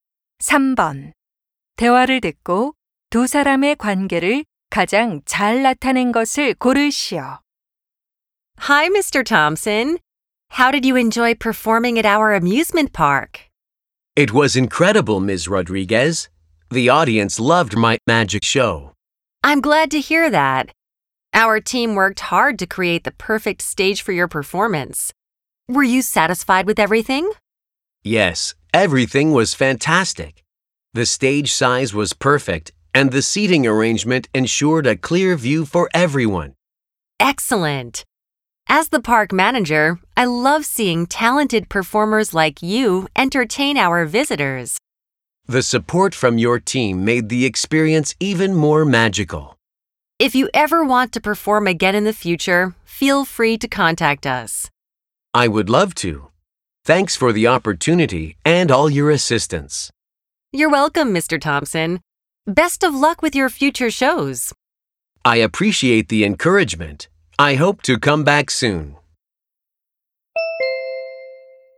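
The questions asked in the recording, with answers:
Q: 대화를 듣고 두 사람의 관계를 가장 잘 나타낸 것을 고르시오.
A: 마술사 — 놀이공원 관리자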